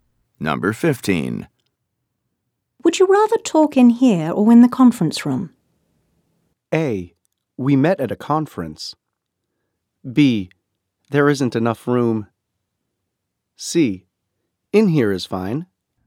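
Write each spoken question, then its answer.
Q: Would you rather talk in here or in the conference room?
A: C: In here is fine.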